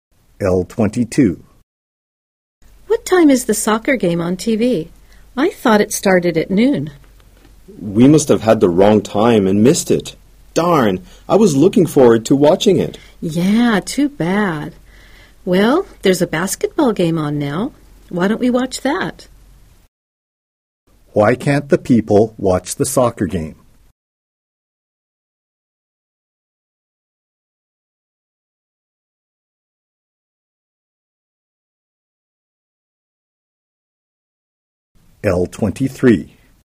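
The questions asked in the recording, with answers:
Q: Why can't the people watch the soccer game?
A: They had the wrong time and missed it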